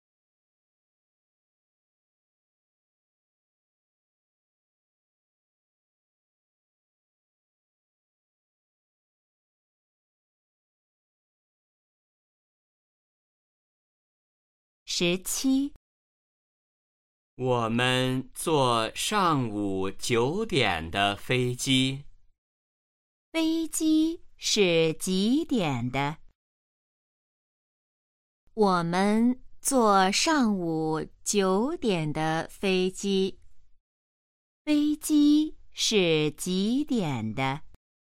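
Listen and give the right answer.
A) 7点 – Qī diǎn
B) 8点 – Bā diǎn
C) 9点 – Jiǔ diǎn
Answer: C) 9点 – Jiǔ diǎn

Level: HSK1- Đề 04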